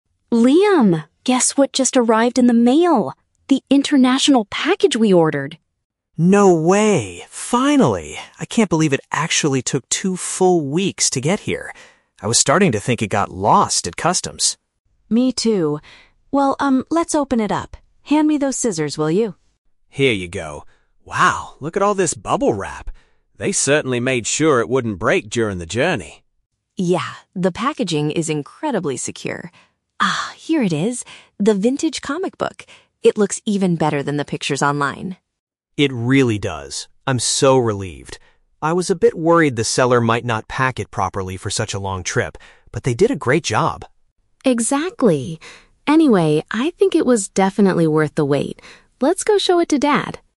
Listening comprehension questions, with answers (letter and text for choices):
Listen to a conversation between a brother and sister opening a package, and choose the best answer (A, B, or C) for each question.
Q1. What is the siblings' main reaction at the beginning of the conversation?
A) They are annoyed because the item was damaged by the delivery company.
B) They are thrilled that their delayed order has finally been delivered.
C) They are worried because their parcel is currently stuck at customs.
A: B) They are thrilled that their delayed order has finally been delivered.

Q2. What is Chloe's opinion on how the item was prepared for shipping?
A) It was packed very safely to prevent any damage.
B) It was protected poorly by the online seller.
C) It was wrapped in a box that was too hard to open.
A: A) It was packed very safely to prevent any damage.

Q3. What exactly did the siblings purchase from the international store?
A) A sharp tool used for cutting boxes.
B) A rare, old reading material.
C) A vintage photograph of their father.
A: B) A rare, old reading material.

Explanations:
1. The siblings say "Finally!" and mention it "took two full weeks to get here." Option B paraphrases this as being "thrilled that their delayed order has finally been delivered."
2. Chloe says "the packaging is incredibly secure" and Liam notes they used "bubble wrap" so it "wouldn't break." Option A uses synonyms: "packed very safely" to "prevent any damage."
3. Chloe pulls out a "vintage comic book." Option B paraphrases this as a "rare, old reading material."

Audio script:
Chloe: Liam, guess what just arrived in the mail! The international package we ordered.
Liam: No way! Finally! I can't believe it actually took two full weeks to get here. I was starting to think it got lost at customs.
Chloe: Me too. Well, um, let's open it up. Hand me those scissors, will you?
Liam: Here you go. Wow, look at all this bubble wrap. They certainly made sure it wouldn't break during the journey.
Chloe: Yeah, the packaging is incredibly secure. Ah, here it is... the vintage comic book. It looks even better than the pictures online.
Liam: It really does. I'm so relieved. I was a bit worried the seller might not pack it properly for such a long trip, but they did a great job.
Chloe: Exactly. Anyway, I think it was definitely worth the wait. Let's go show it to Dad.